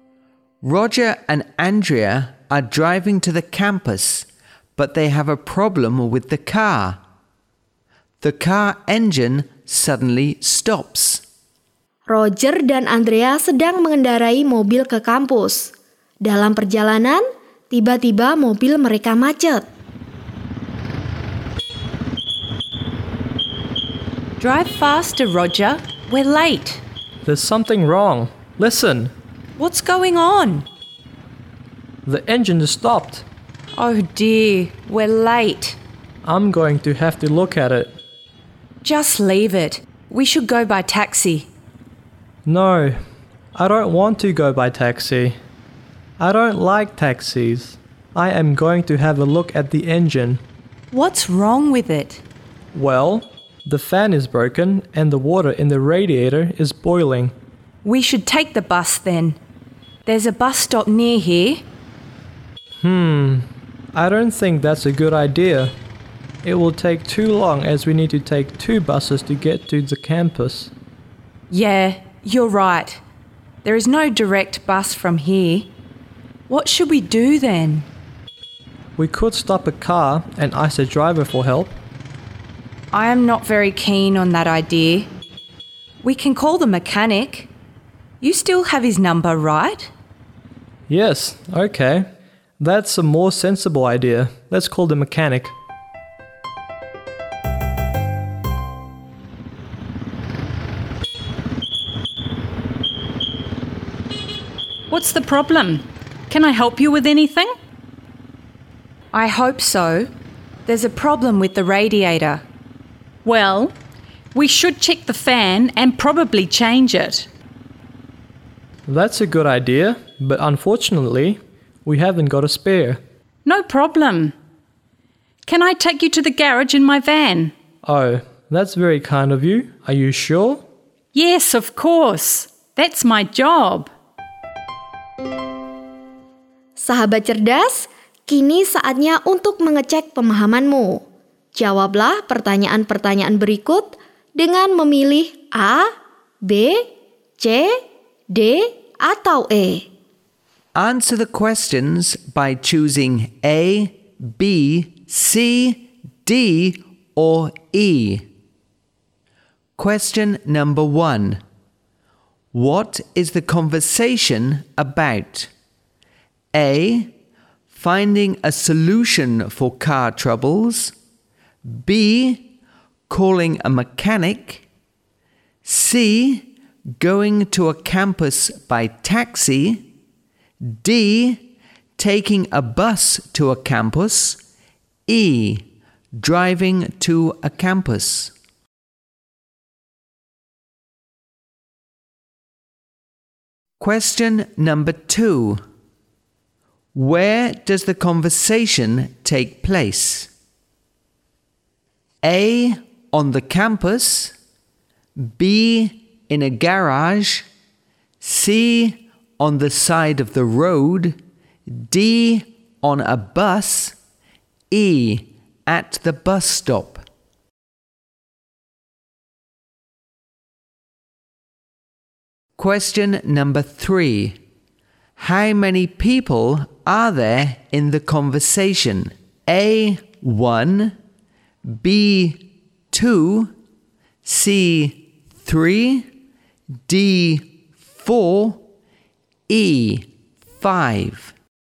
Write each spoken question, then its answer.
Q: What is the conversation about?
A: A. Finding a solution for car troubles.

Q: Where does the conversation take place?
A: C. On the side of the road.

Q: How many people are there in the conversation?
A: C. 3.